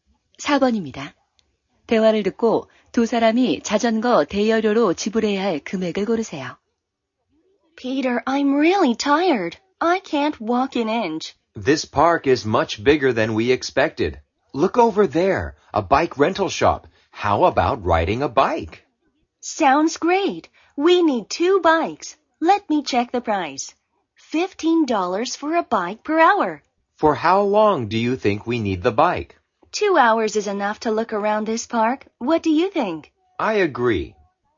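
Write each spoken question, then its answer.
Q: 대화를 듣고 두 사람이 자전거 대여료로 지불해야 할 금액을 고르세요.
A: 60달러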